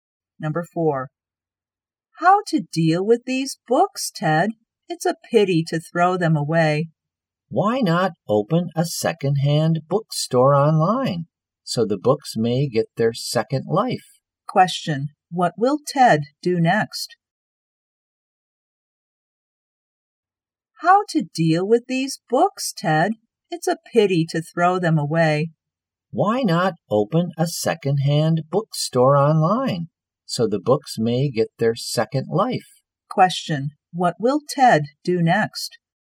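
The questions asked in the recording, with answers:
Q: What will Ted do next?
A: Open a second-hand bookstore online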